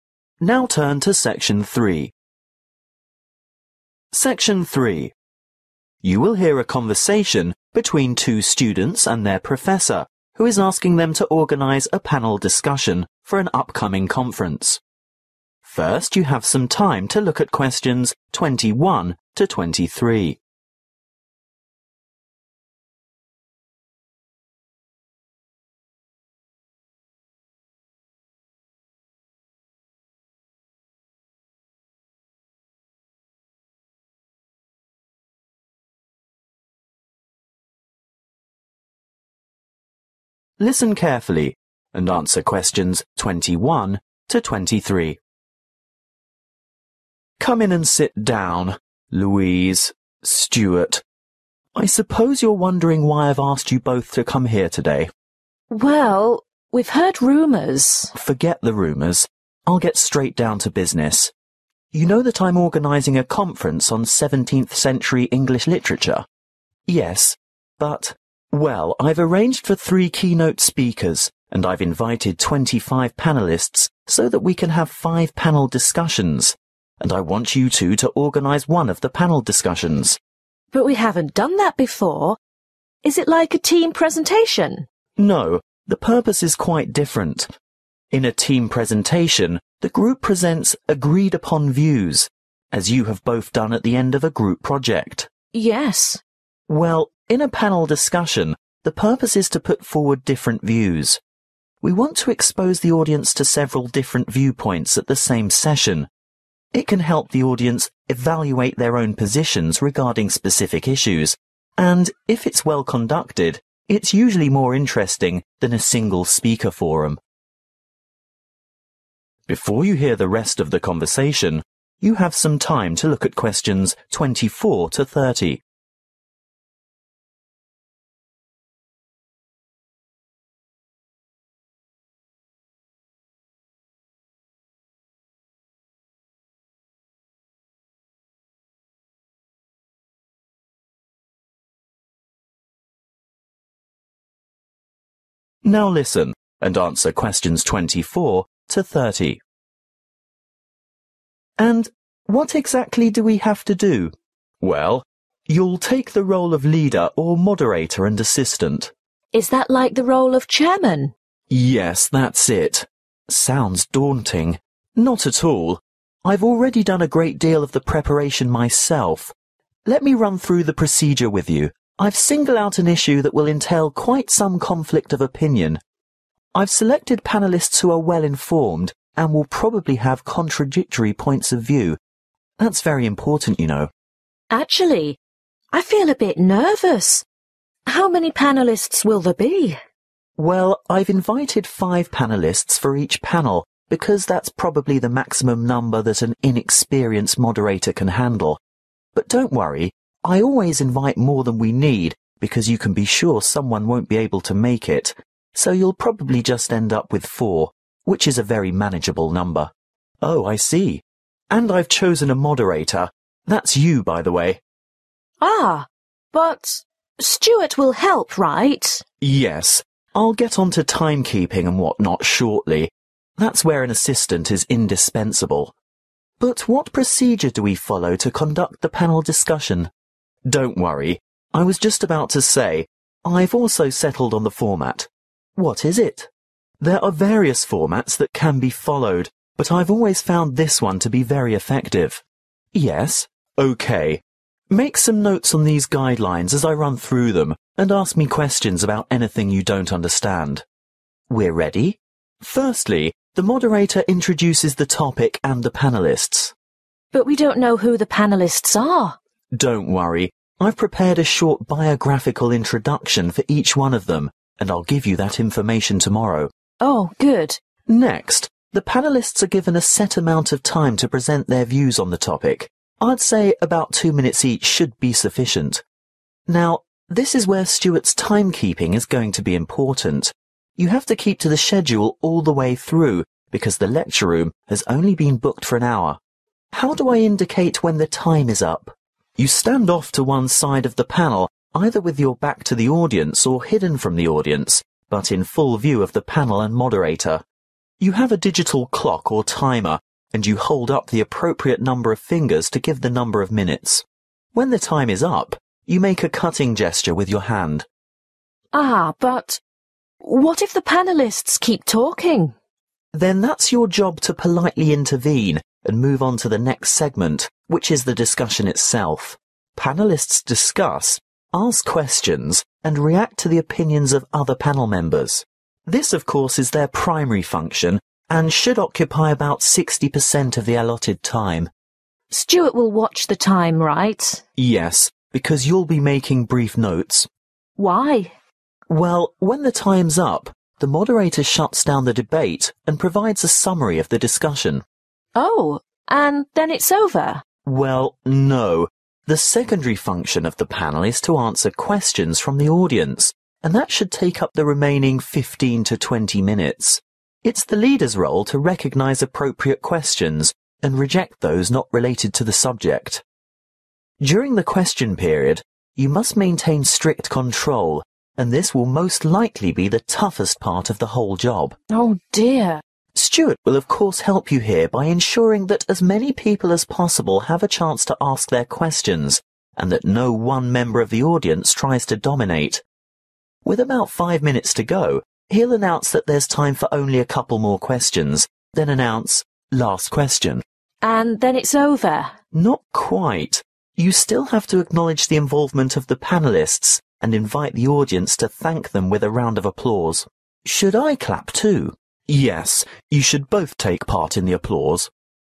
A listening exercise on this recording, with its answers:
Answer the questions below. Write NO MORE THAN TWO WORDS AND/ OR A NUMBER for each answer.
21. What period of English Literature will the conference cover?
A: 17 century

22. How many panel discussions have been arranged?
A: 5

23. What is the aim of a panel discussion? To present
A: views/ opinions

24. Identify topic of interest involving some (24)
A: conflict

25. Select a (25)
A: moderator/ leader

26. Decide on (26)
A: format

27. Introduction of topic and speakers-get (27) information form prof.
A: biographical

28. Each panelist speaks for 2 mins-make a hand (28) to show time is up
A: gesture

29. Close discussion and give (29)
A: summary

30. At end of question time panel is thanked and audience shows appreciation by (30)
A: applause